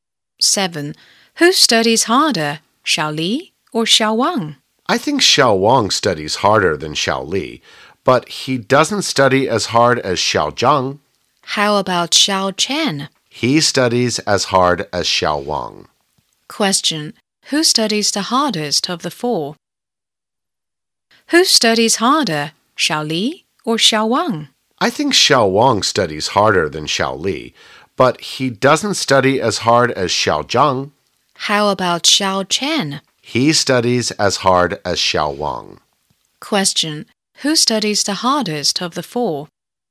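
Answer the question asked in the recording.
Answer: Xiao Zhang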